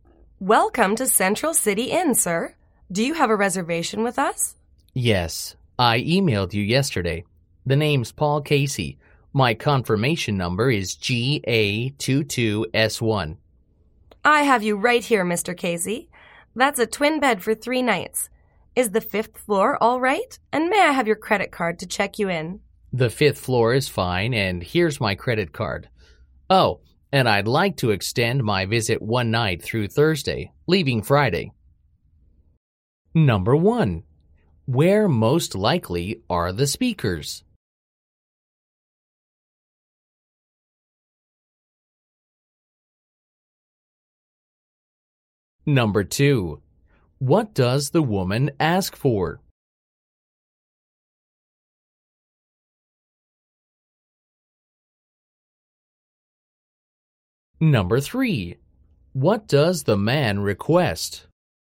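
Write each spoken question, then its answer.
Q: Where most likely are the speakers?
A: At a hotel

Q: What does the woman ask for?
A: A credit card

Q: What does the man request?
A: To extend his stay by one night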